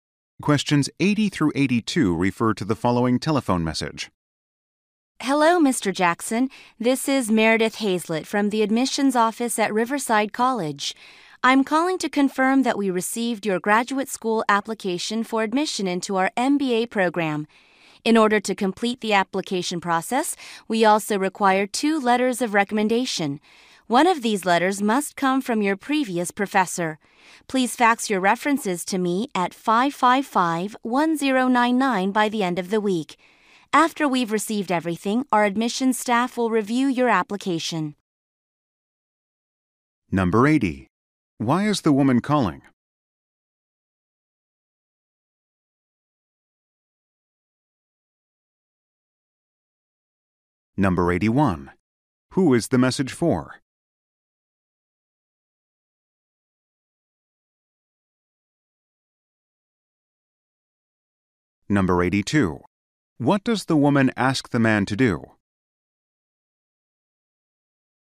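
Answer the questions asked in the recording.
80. To confirm that his application was received
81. Mr. Jackson, a graduate school applicant
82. Fax two letters of recommendation by the end of the week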